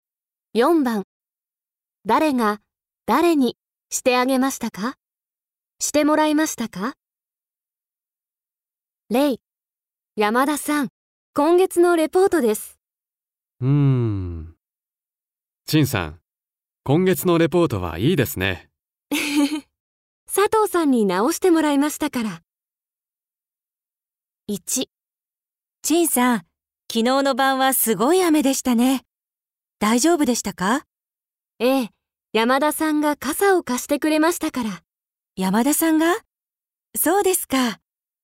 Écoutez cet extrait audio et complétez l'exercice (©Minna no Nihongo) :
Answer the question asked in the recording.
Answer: チンさん は 山田さん に かさ を かりました

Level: JLPT5